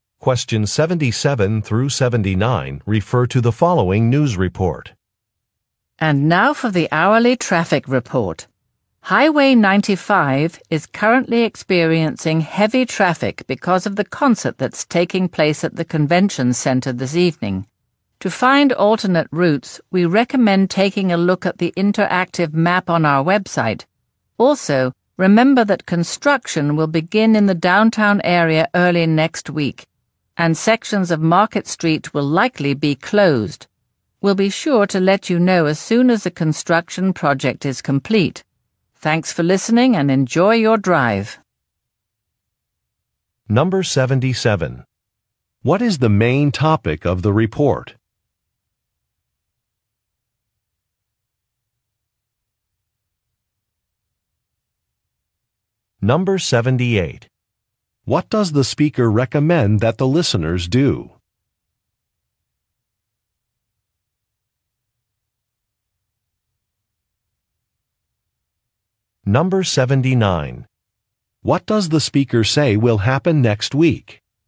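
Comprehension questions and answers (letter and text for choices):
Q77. What is the main topic of the report?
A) Community activities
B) Traffic updates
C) Business tips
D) Entertainment news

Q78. What does the speaker recommend that the listeners do?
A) Fill out a survey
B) Attend a town meeting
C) Check a map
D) Drive slowly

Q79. What does the speaker say will happen next week?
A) A prize will be given.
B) A construction project will start.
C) A company office will open.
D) A government official will be interviewed.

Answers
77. B) Traffic updates
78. C) Check a map
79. B) A construction project will start.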